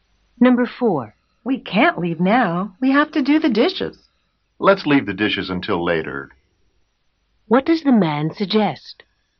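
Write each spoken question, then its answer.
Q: What does the man suggest?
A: Leaving now and doing the dishes later.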